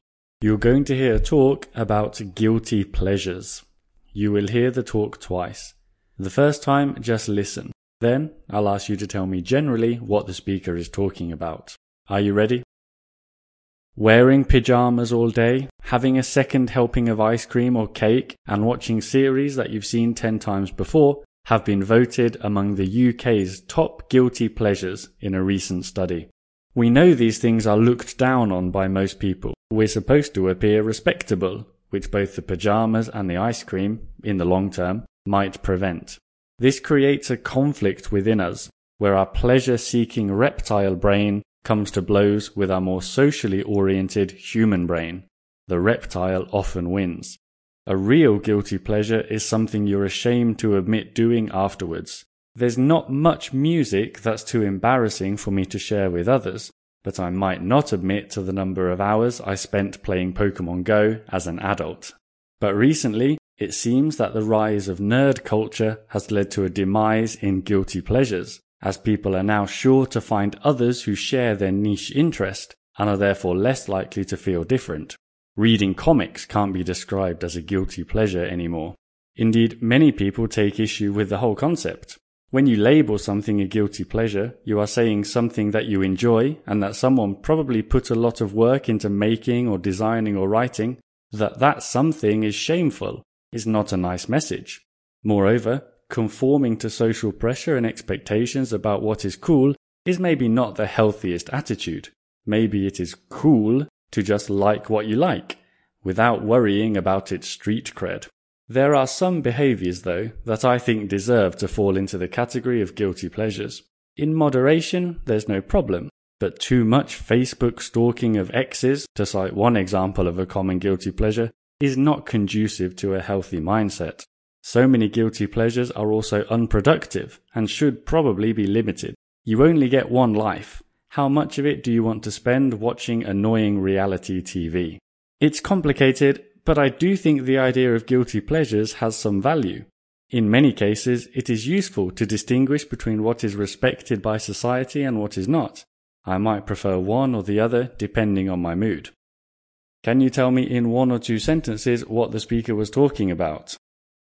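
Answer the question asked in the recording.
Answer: Guilty pleasures: what they are, whether the concept still makes sense, and its value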